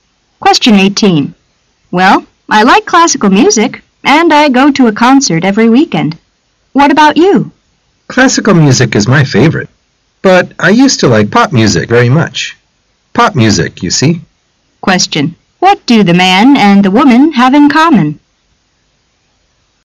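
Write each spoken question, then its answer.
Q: What do the man and the woman have in common?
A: They both like classical music

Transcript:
[解析] W: Well, I like classical music, and I go to a concert every weekend. What about you? M: Classical music is my favorite. But I used to like pop music very much. Pop music, you see! Q: What do the man and the woman have in common?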